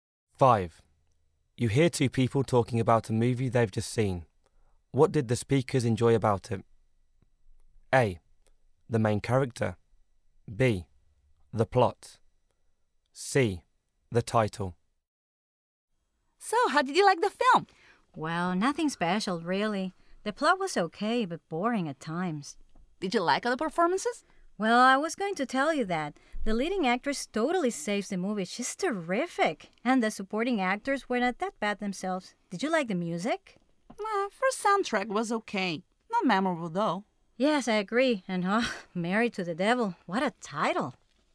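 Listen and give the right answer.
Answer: A: The main character.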